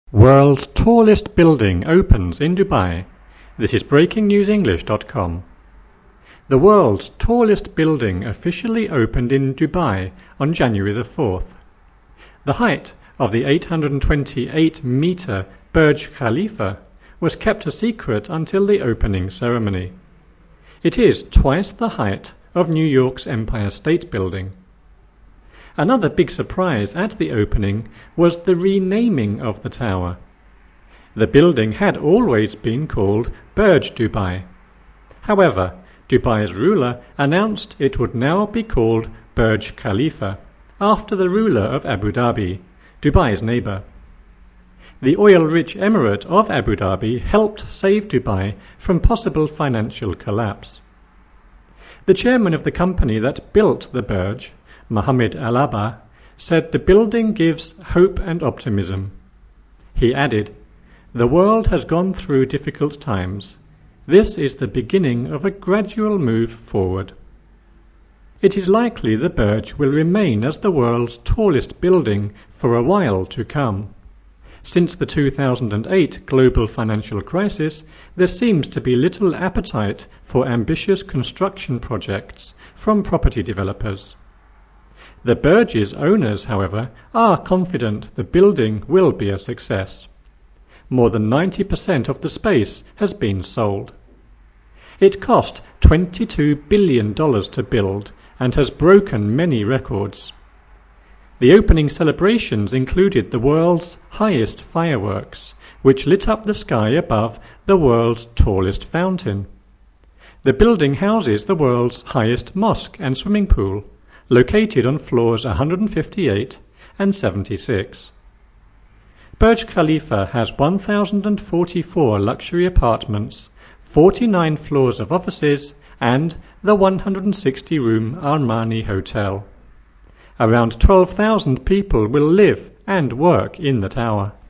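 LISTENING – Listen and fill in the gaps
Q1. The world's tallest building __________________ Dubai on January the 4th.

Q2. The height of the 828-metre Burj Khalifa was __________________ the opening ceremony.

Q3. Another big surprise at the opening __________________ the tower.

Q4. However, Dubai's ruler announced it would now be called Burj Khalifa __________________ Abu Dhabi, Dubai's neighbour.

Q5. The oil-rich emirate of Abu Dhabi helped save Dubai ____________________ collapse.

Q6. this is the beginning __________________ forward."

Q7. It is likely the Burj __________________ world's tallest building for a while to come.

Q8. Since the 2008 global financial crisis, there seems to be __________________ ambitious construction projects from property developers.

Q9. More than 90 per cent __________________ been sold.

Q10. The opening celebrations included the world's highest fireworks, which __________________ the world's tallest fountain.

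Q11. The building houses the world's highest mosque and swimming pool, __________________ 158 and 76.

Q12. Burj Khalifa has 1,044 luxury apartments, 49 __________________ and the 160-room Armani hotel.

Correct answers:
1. officially opened in
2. kept a secret until
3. was the renaming of
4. after the ruler of
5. from possible financial
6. of a gradual move
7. will remain as the
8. little appetite for
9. of the space has
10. lit up the sky above
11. located on floors
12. floors of offices

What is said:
World's tallest building opens in Dubai
The world's tallest building officially opened in Dubai on January the 4th. The height of the 828-metre Burj Khalifa was kept a secret until the opening ceremony. It is twice the height of New York's Empire State Building. Another big surprise at the opening was the renaming of the tower. The building had always been called Burj Dubai. However, Dubai's ruler announced it would now be called Burj Khalifa after the ruler of Abu Dhabi, Dubai's neighbour. 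The oil-rich emirate of Abu Dhabi helped save Dubai from possible financial collapse. The chairman of the company that built the Burj, Mohamed Alabbar, said the building gives "hope and optimism". He added: "The world has gone through ...difficult times... this is the beginning of a gradual move forward."
It is likely the Burj will remain as the world's tallest building for a while to come. Since the 2008 global financial crisis, there seems to be little appetite for ambitious construction projects from property developers. The Burj's owners, however, are confident the building will be a success. More than 90 per cent of the space has been sold. It cost $22 billion to build and has broken many records. The opening celebrations included the world's highest fireworks, which lit up the sky above the world's tallest fountain. The building houses the world's highest mosque and swimming pool, located on floors 158 and 76. 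Burj Khalifa has 1,044 luxury apartments, 49 floors of offices and the 160-room Armani hotel. Around 12,000 people will live and work in the tower.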